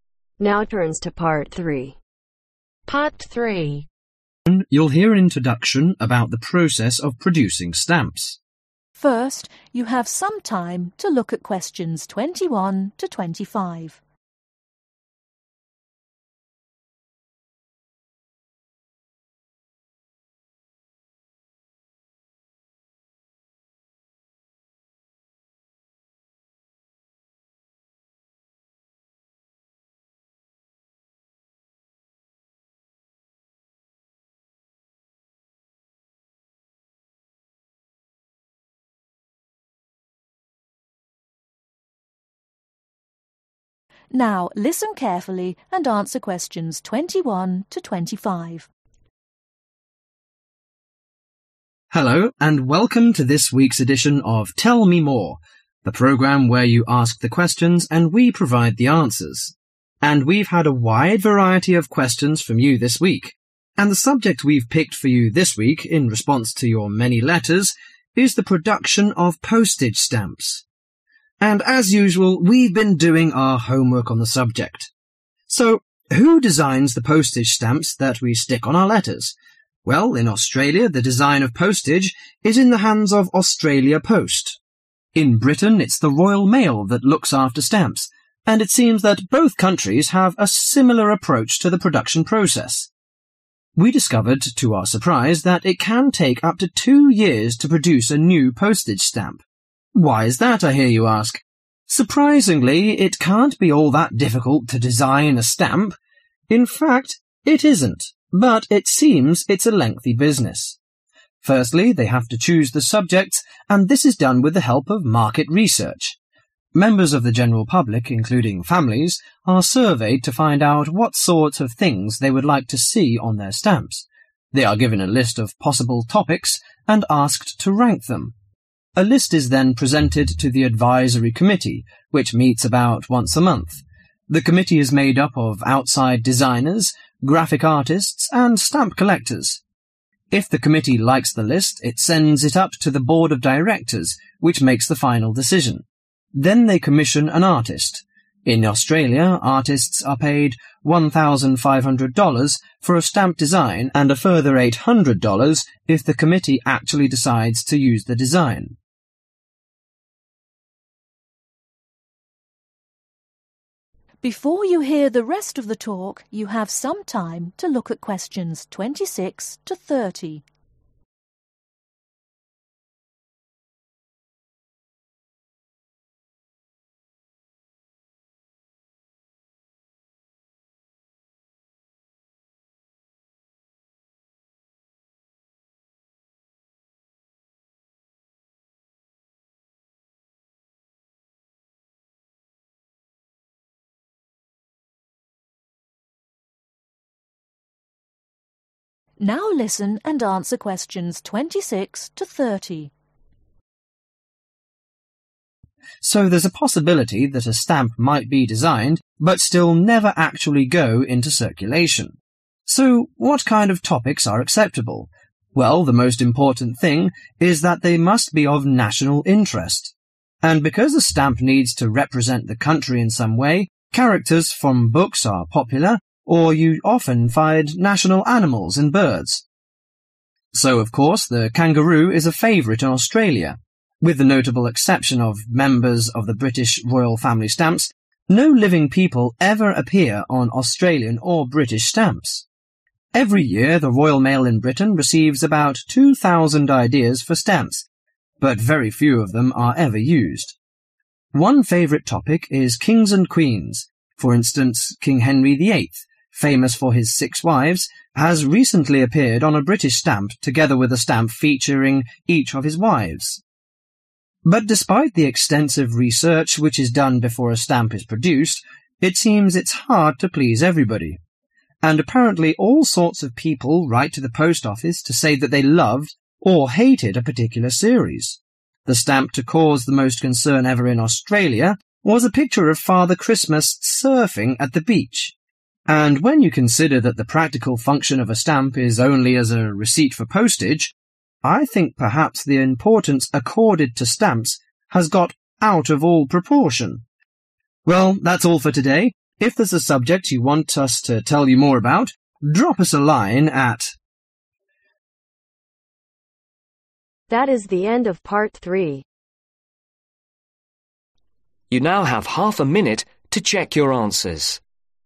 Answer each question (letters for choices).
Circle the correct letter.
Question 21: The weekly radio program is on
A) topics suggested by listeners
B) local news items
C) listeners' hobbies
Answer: A

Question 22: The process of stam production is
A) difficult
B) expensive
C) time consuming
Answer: C

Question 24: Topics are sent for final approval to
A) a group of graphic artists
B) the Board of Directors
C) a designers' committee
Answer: B

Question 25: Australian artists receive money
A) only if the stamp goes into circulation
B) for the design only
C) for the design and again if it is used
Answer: C

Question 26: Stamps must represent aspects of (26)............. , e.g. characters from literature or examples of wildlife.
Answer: National Interest

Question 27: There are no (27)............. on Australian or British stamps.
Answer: Living People

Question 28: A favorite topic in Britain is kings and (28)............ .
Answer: Queens

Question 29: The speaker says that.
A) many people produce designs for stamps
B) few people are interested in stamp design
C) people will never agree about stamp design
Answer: C

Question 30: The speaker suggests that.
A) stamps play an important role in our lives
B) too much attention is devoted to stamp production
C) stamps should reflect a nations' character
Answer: B